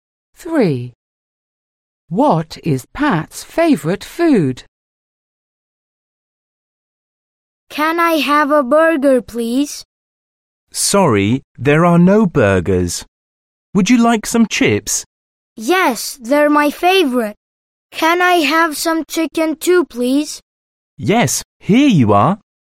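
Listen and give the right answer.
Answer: Chips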